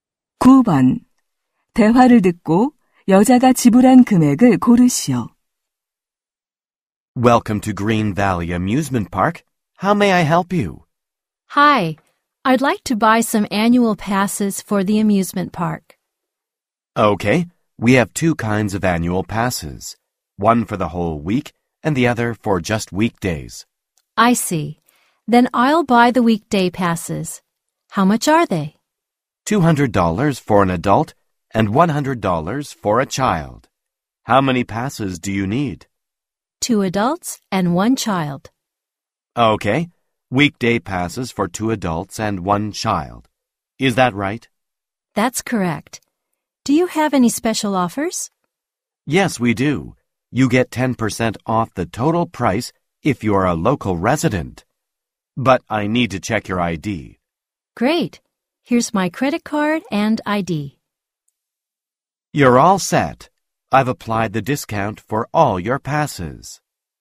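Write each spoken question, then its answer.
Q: 대화를 듣고 여자가 지불한 금액을 고르시오.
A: $450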